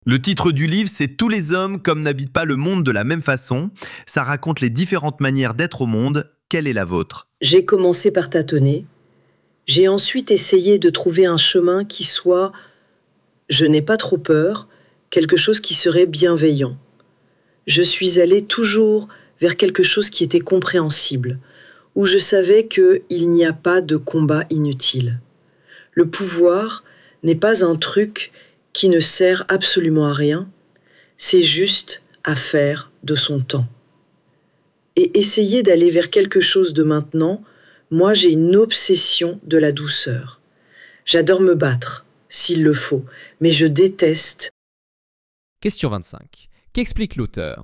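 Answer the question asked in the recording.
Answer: Sa manière d'être au monde : chercher un chemin bienveillant, guidé par la douceur et en évitant les combats inutiles.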